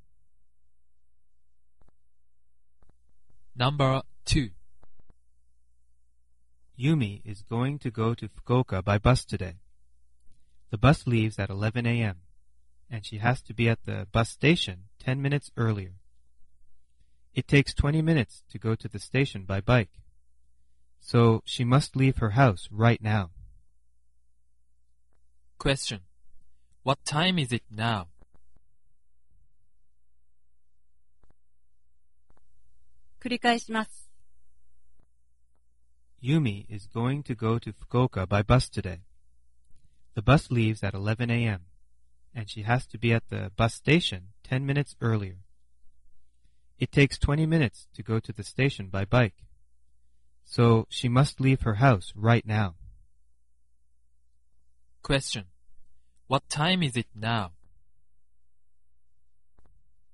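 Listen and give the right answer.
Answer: 10:30 a.m.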